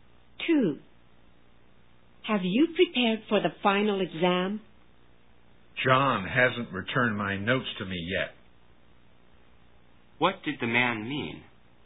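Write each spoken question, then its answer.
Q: What did the man mean?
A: He hasn't been able to prepare because John still has his notes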